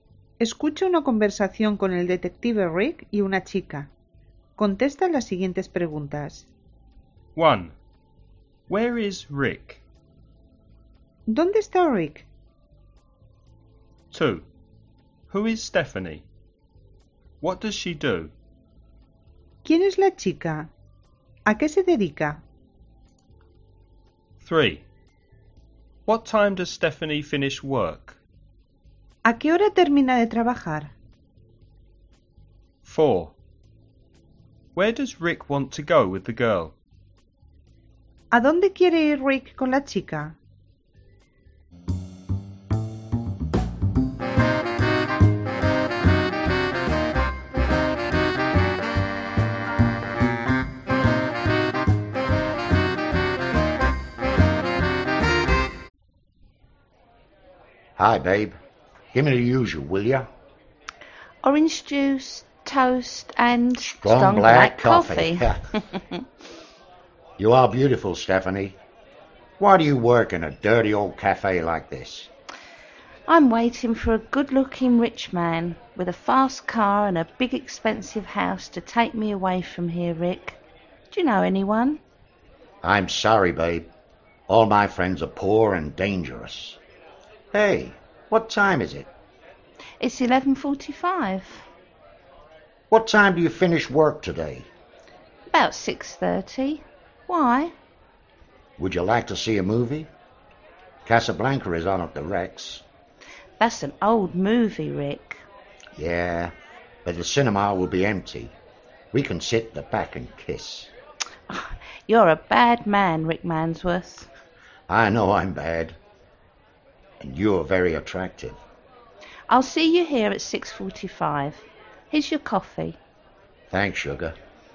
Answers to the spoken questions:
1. He's in a cafe.
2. She's a waitress.
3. About 6:30.
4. To the cinema.